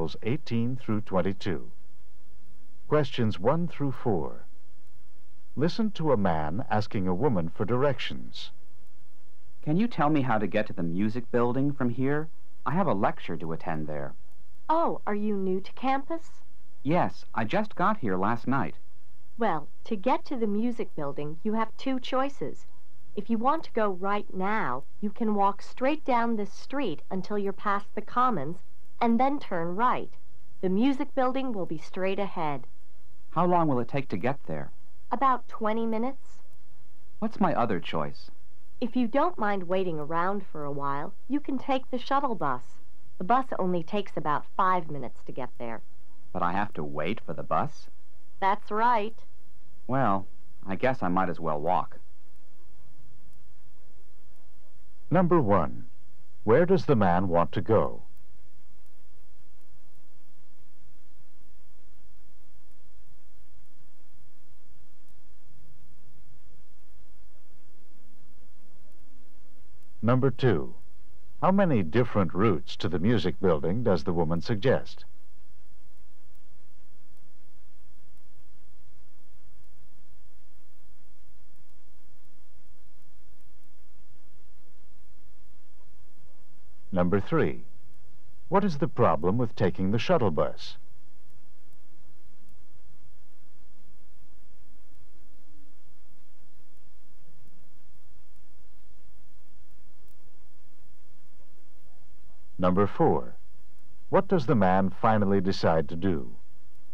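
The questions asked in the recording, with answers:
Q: Where does the man want to go?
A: To the music building.

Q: How many different routes to the music building does the woman suggest?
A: Two.

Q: What is the problem with taking the shuttle bus?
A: He would have to wait for it.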